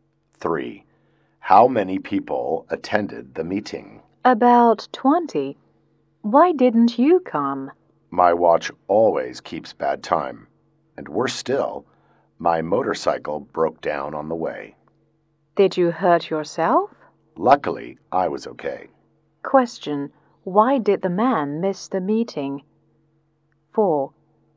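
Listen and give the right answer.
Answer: His watch kept bad time and his motorcycle broke down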